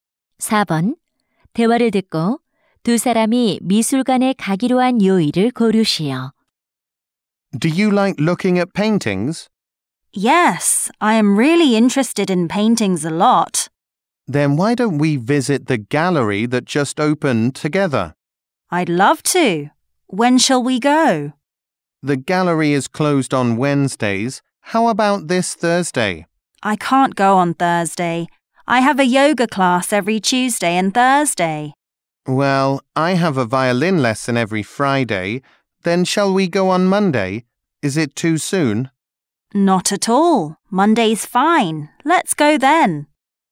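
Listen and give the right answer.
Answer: 월요일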